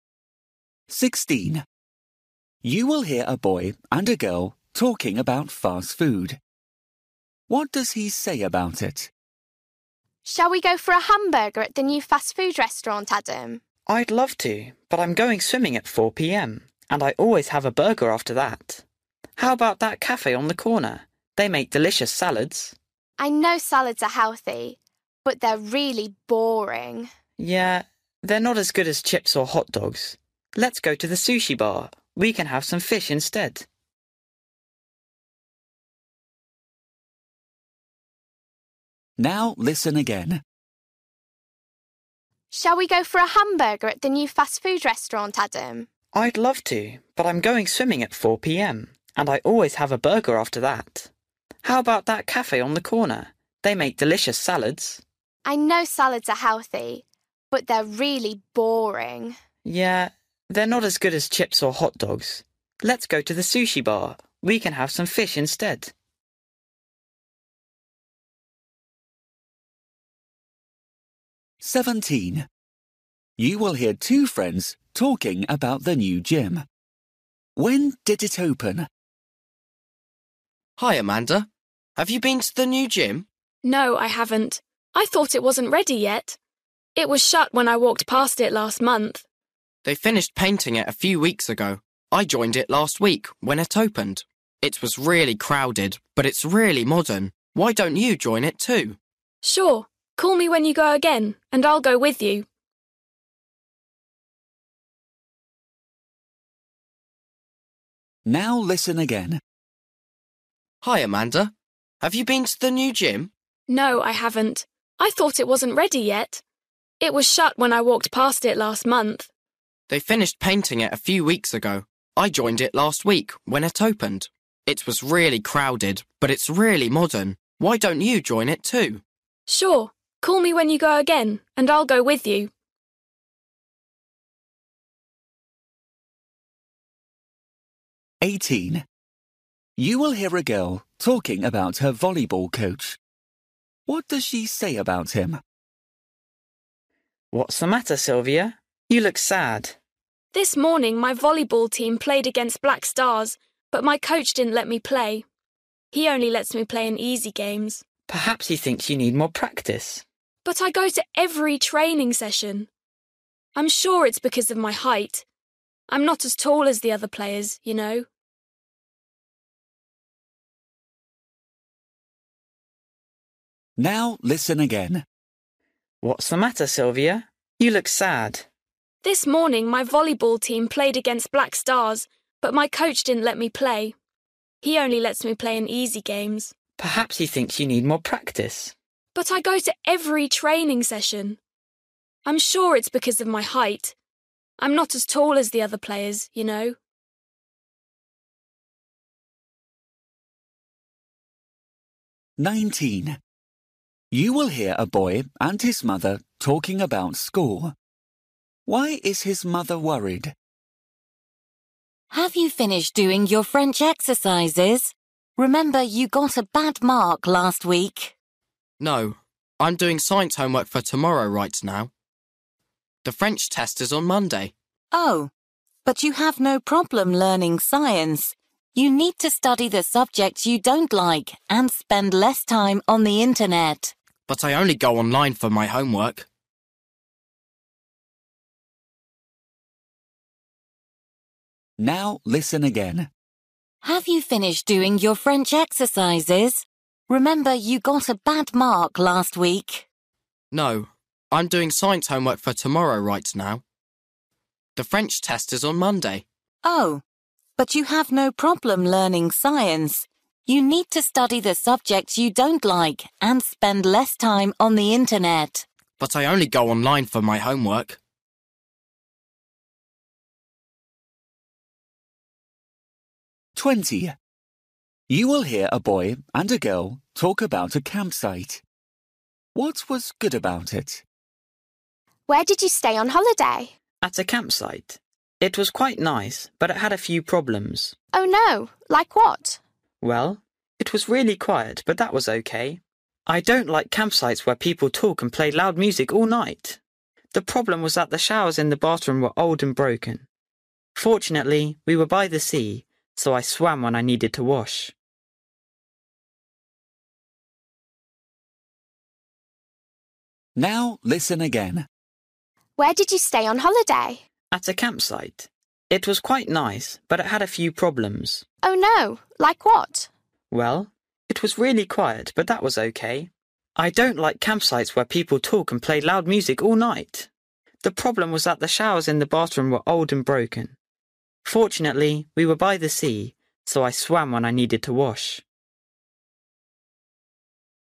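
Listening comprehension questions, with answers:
For each question, choose the correct answer.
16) You will hear boy and a girl talking about fast food. What does he say about it?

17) You will hear two friends talking about the new gym. When did it open?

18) You will hear a girl talking about her volleyball coach. What does she say about him?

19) You will hear a boy and his mother talking about school. Why is his mother worried?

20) You will hear a boy and a girl talking about a campsite. What was good about it?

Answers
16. He always has a burger after swimming.
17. Last week
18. He only lets her play in easy games, she thinks because she is not tall enough.
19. He got a bad mark in French and isn't studying for the French test.
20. It was really quiet and by the sea.

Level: Luyện nghe trình độ A2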